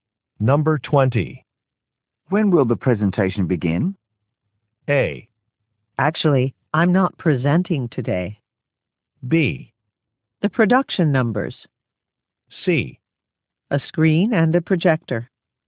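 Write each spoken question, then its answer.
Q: When will the presentation begin?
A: A: Actually, I'm not presenting today.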